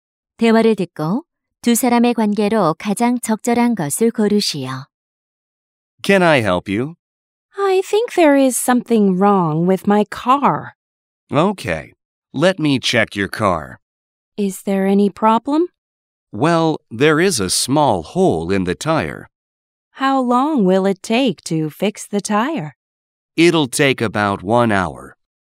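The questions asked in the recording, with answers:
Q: 대화를 듣고 두 사람의 관계로 가장 적절한 것을 고르시오.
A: 정비사 - 손님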